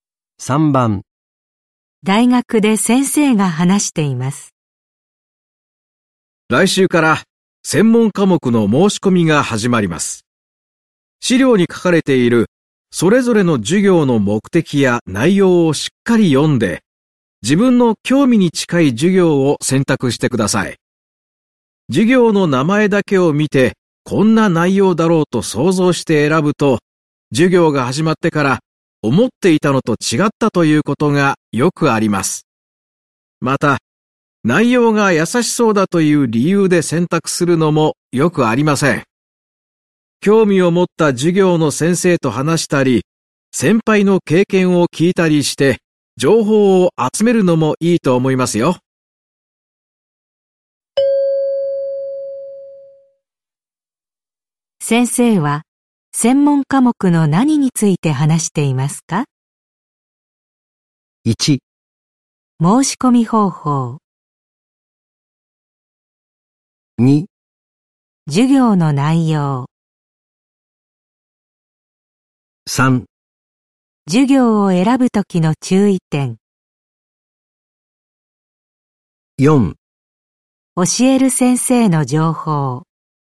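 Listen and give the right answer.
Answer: 3: 授業を選ぶときの注意点。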